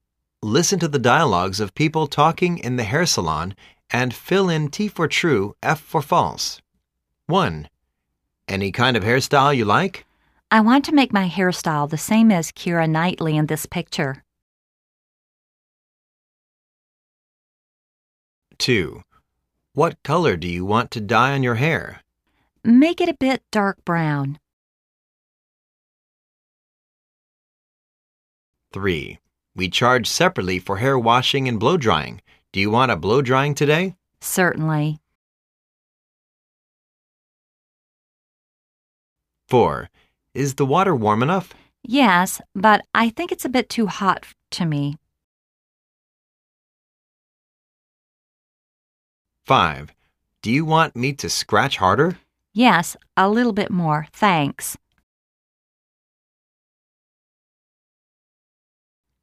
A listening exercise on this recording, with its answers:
Listen to the dialogues of people talking in the hair saloon and fill in T for "True", F for "False".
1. She wants to have the same hair style as Keira Knightley.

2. She wants to dye her hair black.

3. She refuses to dry her hair after wash.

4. She thinks the water is too hot.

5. She thinks she had too much scratching.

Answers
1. T
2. F
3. F
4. T
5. F